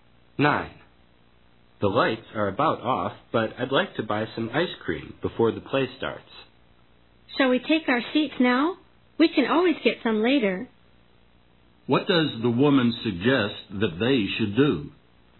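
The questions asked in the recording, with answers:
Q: What does the woman suggest that they should do?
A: Take their seats now and get ice cream later.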